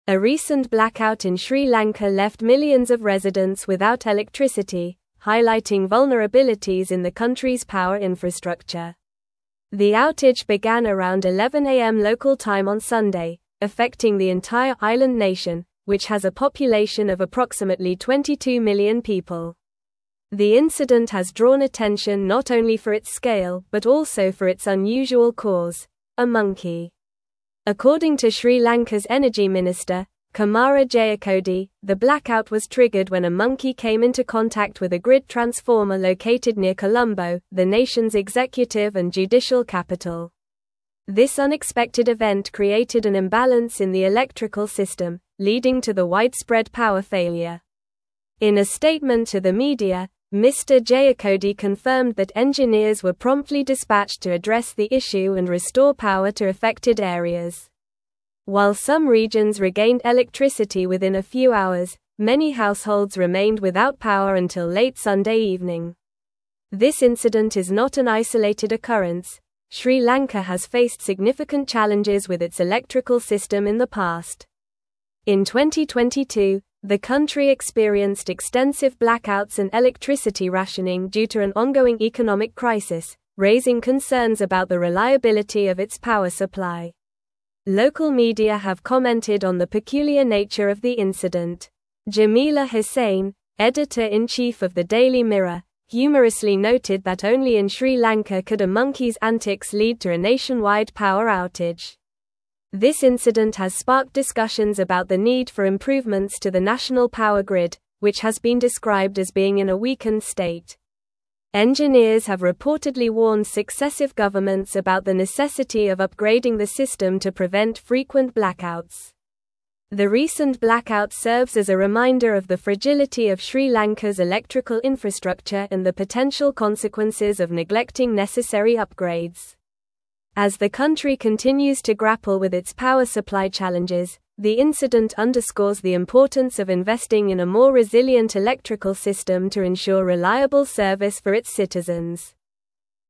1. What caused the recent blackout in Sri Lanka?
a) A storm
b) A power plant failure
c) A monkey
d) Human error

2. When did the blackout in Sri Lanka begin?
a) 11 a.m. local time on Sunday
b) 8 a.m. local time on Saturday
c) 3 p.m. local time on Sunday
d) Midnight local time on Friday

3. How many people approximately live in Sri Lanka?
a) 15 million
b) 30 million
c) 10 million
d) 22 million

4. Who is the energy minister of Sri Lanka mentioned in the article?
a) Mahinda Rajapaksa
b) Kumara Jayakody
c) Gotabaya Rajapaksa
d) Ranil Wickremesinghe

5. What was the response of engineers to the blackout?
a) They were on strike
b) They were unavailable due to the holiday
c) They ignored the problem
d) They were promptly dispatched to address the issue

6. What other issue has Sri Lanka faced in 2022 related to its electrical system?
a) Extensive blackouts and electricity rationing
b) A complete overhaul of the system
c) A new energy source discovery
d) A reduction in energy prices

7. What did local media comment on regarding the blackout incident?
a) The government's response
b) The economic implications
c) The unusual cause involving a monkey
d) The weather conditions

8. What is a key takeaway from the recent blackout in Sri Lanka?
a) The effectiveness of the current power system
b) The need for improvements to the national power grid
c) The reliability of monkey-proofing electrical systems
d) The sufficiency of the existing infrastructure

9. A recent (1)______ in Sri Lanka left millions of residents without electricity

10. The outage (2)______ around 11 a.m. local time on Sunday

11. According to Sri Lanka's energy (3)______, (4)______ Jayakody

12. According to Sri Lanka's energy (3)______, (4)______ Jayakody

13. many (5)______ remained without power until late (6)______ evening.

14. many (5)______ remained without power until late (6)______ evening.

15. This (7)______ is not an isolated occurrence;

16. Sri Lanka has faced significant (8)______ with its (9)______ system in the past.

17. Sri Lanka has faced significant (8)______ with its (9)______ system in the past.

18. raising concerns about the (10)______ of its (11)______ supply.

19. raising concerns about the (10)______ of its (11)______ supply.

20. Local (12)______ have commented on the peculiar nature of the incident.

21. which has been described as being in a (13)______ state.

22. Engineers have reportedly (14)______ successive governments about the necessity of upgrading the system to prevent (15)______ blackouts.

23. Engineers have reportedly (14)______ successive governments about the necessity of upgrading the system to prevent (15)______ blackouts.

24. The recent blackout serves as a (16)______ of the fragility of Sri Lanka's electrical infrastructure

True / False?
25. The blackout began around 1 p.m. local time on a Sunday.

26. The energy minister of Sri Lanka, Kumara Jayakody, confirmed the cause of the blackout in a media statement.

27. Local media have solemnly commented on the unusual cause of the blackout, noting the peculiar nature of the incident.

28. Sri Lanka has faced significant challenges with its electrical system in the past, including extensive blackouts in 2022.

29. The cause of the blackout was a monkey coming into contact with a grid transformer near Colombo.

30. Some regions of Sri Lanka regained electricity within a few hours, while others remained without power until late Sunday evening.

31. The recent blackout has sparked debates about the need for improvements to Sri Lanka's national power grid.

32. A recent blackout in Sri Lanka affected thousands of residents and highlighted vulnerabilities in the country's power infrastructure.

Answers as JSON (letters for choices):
{"1": "c", "2": "a", "3": "d", "4": "b", "5": "d", "6": "a", "7": "c", "8": "b", "9": "blackout", "10": "began", "11": "minister", "12": "Kumara", "13": "households", "14": "Sunday", "15": "incident", "16": "challenges", "17": "electrical", "18": "reliability", "19": "power", "20": "media", "21": "weakened", "22": "warned", "23": "frequent", "24": "reminder", "25": "False", "26": "True", "27": "False", "28": "True", "29": "True", "30": "True", "31": "False", "32": "False"}

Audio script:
A recent blackout in Sri Lanka left millions of residents without electricity, highlighting vulnerabilities in the country's power infrastructure. The outage began around 11 a.m. local time on Sunday, affecting the entire island nation, which has a population of approximately 22 million people. The incident has drawn attention not only for its scale but also for its unusual cause: a monkey.
According to Sri Lanka's energy minister, Kumara Jayakody, the blackout was triggered when a monkey came into contact with a grid transformer located near Colombo, the nation's executive and judicial capital. This unexpected event created an imbalance in the electrical system, leading to the widespread power failure. In a statement to the media, Mr. Jayakody confirmed that engineers were promptly dispatched to address the issue and restore power to affected areas.
While some regions regained electricity within a few hours, many households remained without power until late Sunday evening. This incident is not an isolated occurrence; Sri Lanka has faced significant challenges with its electrical system in the past. In 2022, the country experienced extensive blackouts and electricity rationing due to an ongoing economic crisis, raising concerns about the reliability of its power supply.
Local media have commented on the peculiar nature of the incident. Jamila Husain, editor-in-chief of the Daily Mirror, humorously noted that only in Sri Lanka could a monkey's antics lead to a nationwide power outage. This incident has sparked discussions about the need for improvements to the national power grid, which has been described as being in a weakened state. Engineers have reportedly warned successive governments about the necessity of upgrading the system to prevent frequent blackouts.
The recent blackout serves as a reminder of the fragility of Sri Lanka's electrical infrastructure and the potential consequences of neglecting necessary upgrades. As the country continues to grapple with its power supply challenges, the incident underscores the importance of investing in a more resilient electrical system to ensure reliable service for its citizens.

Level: Level 4